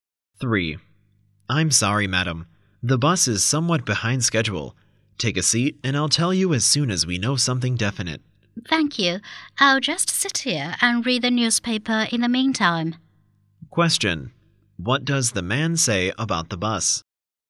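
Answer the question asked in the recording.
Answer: It is late / behind schedule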